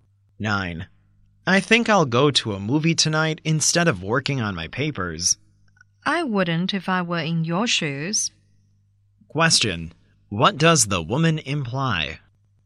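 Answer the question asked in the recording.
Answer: The man shouldn't go to the movie; he should work on his papers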